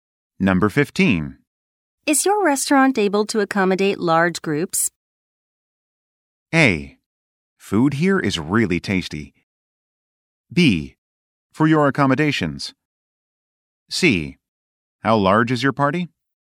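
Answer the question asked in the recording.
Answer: C: How large is your party?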